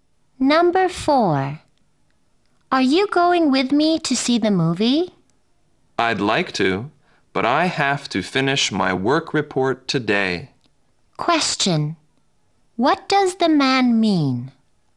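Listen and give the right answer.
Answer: He can't go because he has to finish his work report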